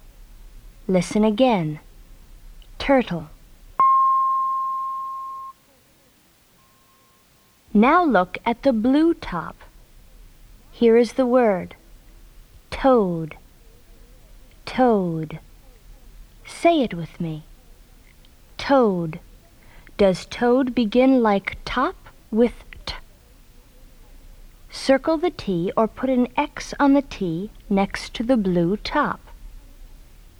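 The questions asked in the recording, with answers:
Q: Does toad begin like top with T?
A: Yes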